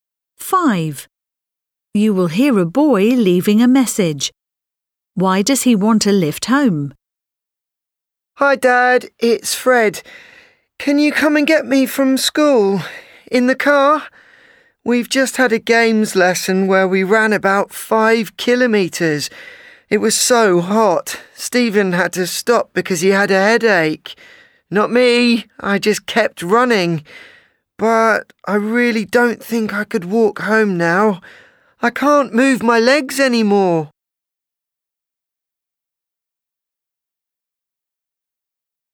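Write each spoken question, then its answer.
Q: Why does he want a lift home?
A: He is too tired to walk after running about 5 kilometres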